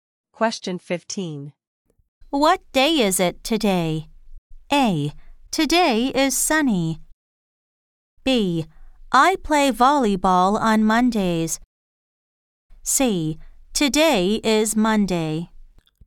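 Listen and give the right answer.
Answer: C: Today is Monday.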